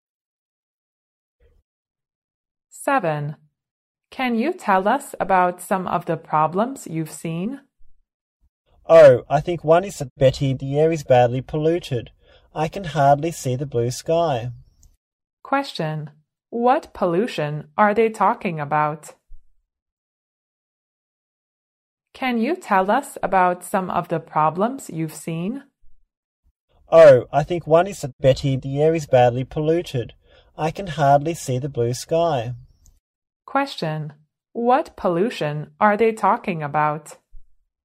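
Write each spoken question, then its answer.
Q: What pollution are they talking about?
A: Air pollution.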